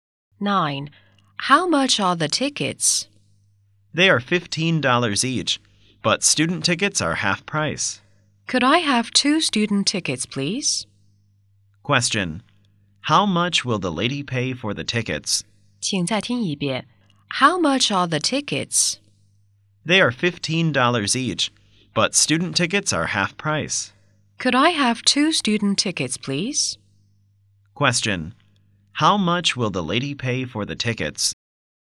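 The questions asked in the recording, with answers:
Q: How much will the lady pay for the tickets?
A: $15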